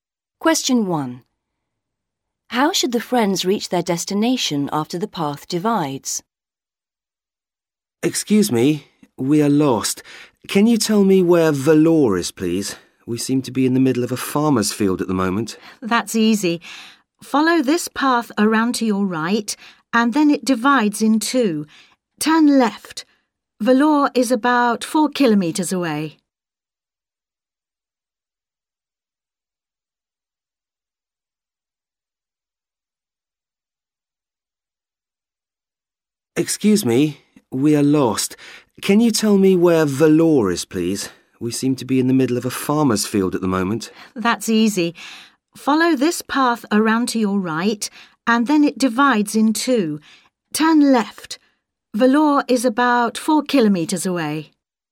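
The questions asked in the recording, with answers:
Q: How should the friends reach their destination after the path divides?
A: Turn left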